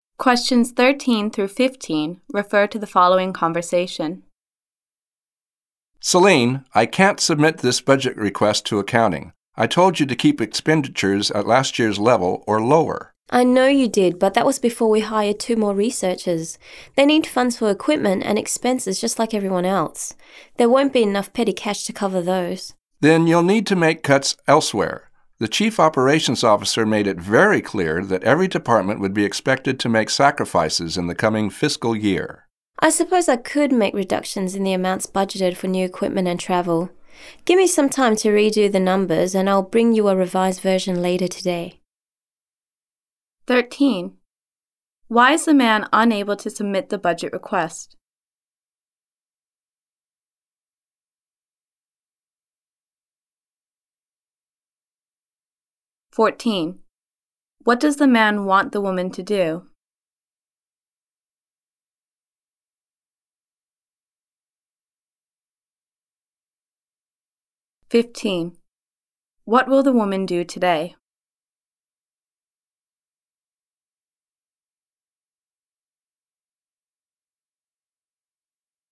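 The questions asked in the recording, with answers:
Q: Why is the man unable to submit the budget request?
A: It exceeds last year's spending level

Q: What does the man want the woman to do?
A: Make cuts elsewhere in the budget

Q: What will the woman do today?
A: Bring him a revised budget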